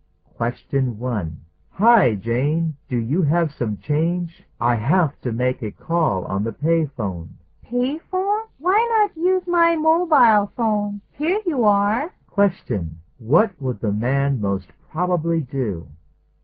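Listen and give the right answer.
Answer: Use the woman's mobile phone to make the call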